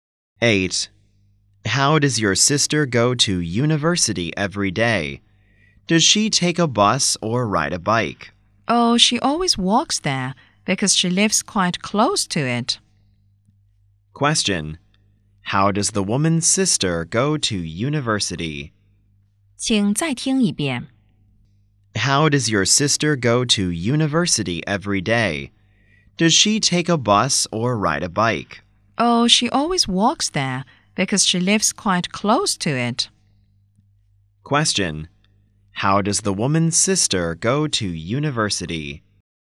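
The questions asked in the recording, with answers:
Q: Question. How does the woman's sister go to university?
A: She walks there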